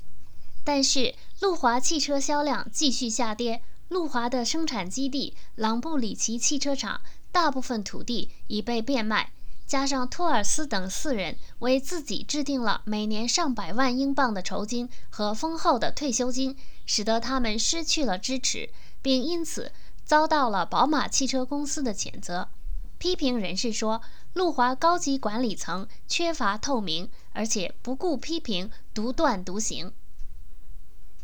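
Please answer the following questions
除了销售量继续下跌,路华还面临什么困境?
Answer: 朗布里奇汽车厂大部分土地已被变卖,托尔斯等四人为自己制定了每年上百万英镑的酬金和丰厚的退休金,失去了支持并遭到宝马谴责;高级管理层缺乏透明、独断独行。

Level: 3rd Year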